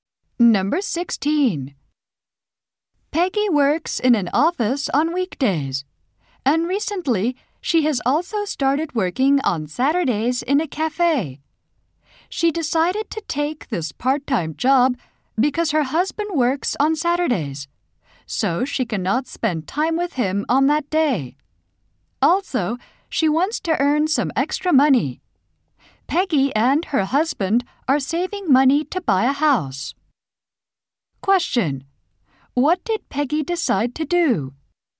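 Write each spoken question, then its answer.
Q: What did Peggy decide to do?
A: Work part-time in a cafe on Saturdays.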